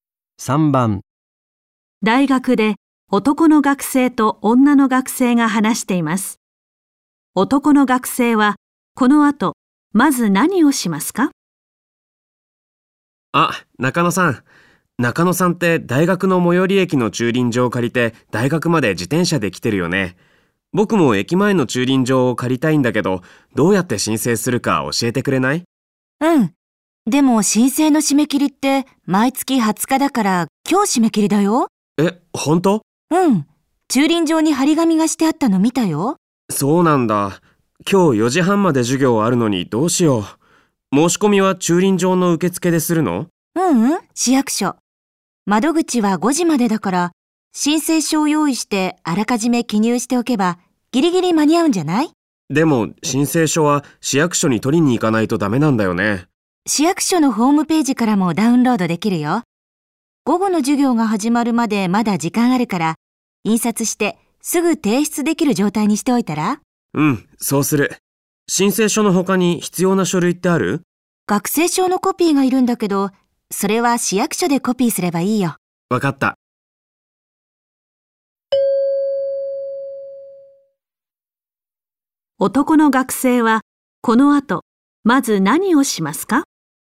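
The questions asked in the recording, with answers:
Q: 男の学生はこの後まず何をしますか?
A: 市役所のホームページから申請書をダウンロードして印刷し、記入する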